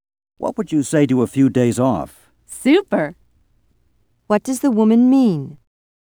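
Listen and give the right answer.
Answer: She would love to have a few days off.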